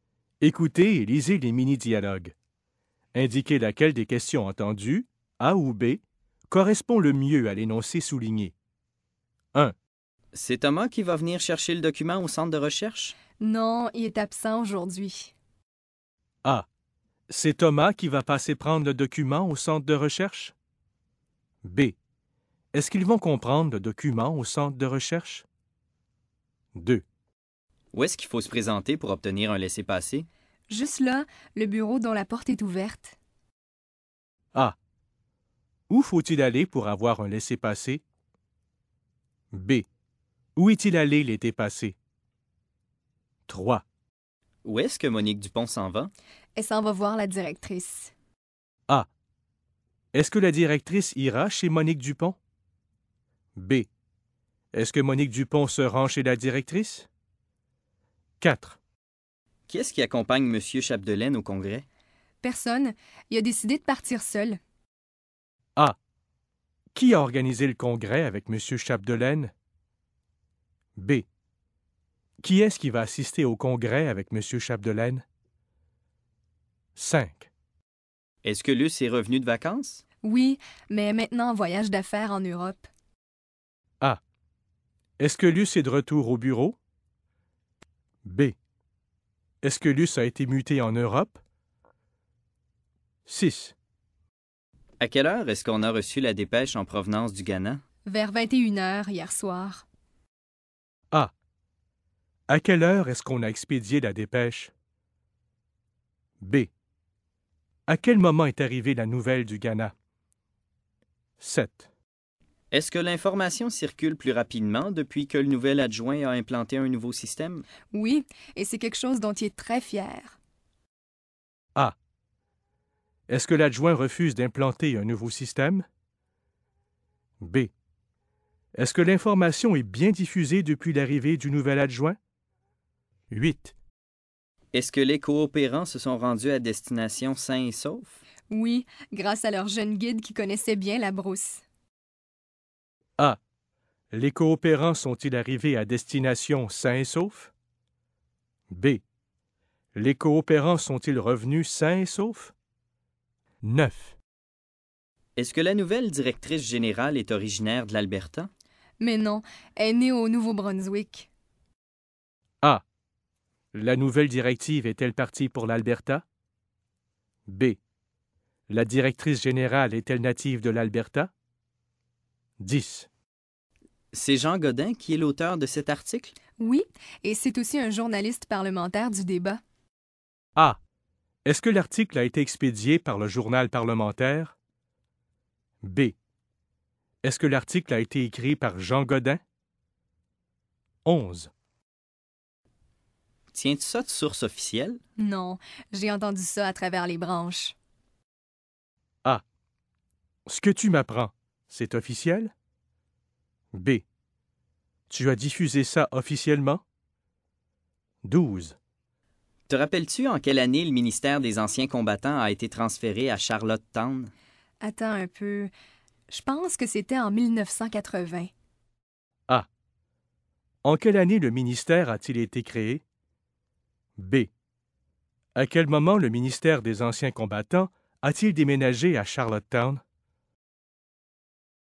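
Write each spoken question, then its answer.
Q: C'est Thomas qui va venir chercher le document au centre de recherche?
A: A: C'est Thomas qui va passer prendre le document au centre de recherche?

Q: Où est-ce qu'il faut se présenter pour obtenir un laissez-passer?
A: A: Où faut-il aller pour avoir un laissez-passer?

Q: Où est-ce que Monique Dupont s'en va?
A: B: Est-ce que Monique Dupont se rend chez la directrice?

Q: Qu'est-ce qui accompagne M.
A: B: Qui est-ce qui va assister au congrès avec M. Chapdelaine?

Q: Est-ce que Luce est revenue de vacances?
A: A: Est-ce que Luce est de retour au bureau?

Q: À quelle heure est-ce qu'on a reçu la dépêche en provenance du Ghana?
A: B: À quel moment est arrivée la nouvelle du Ghana?

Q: Est-ce que l'information circule plus rapidement depuis que le nouvel adjoint a implanté un nouveau système?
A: B: Est-ce que l'information est bien diffusée depuis l'arrivée du nouvel adjoint?

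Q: Est-ce que les coopérants se sont rendus à destination sains et saufs?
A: A: Les coopérants sont-ils arrivés à destination sains et saufs?

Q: Est-ce que la nouvelle directrice générale est originaire de l'Alberta?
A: B: La directrice générale est-elle native de l'Alberta?

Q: C'est Jean Godin qui est l'auteur de cet article?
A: B: Est-ce que l'article a été écrit par Jean Godin?

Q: Tiens-tu ça de source officielle?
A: A: Ce que tu m'apprends, c'est officiel?

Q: Te rappelles-tu en quelle année le ministère des Anciens Combattants a été transféré à Charlottetown?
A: B: À quel moment le ministère des Anciens Combattants a-t-il déménagé à Charlottetown?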